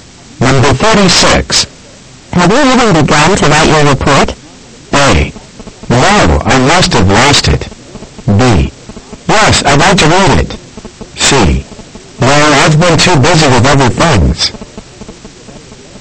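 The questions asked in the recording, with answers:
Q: Have you even begun to write your report?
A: C: No, I've been too busy with other things.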